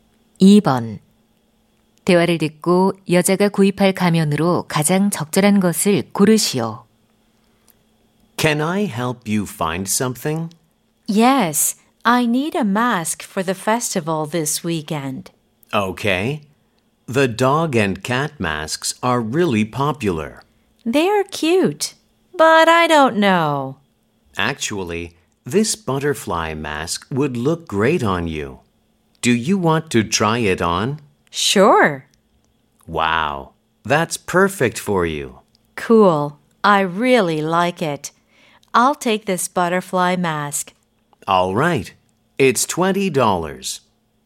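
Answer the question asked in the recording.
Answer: 나비 가면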